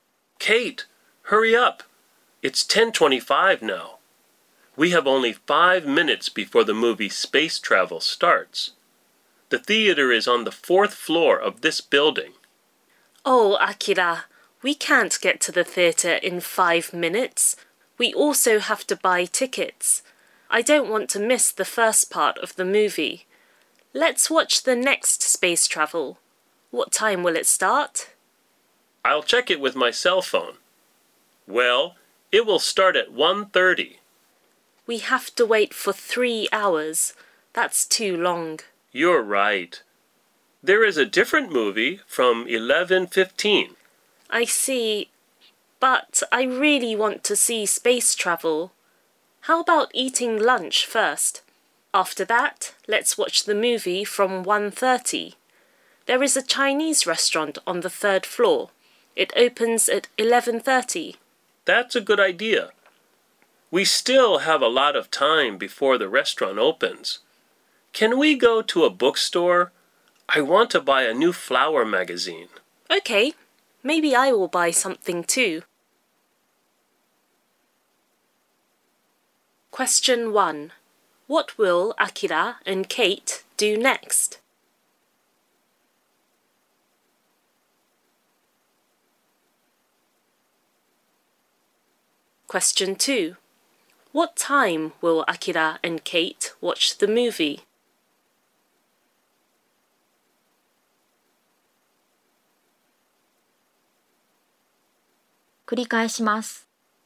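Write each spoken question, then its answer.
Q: What will Akira and Kate do next?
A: Go to a bookstore

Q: What time will Akira and Kate watch the movie?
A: At 1:30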